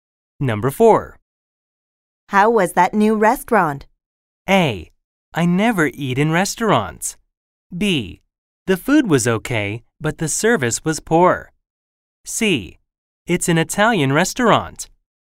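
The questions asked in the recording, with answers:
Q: How was that new restaurant?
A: B: The food was okay, but the service was poor.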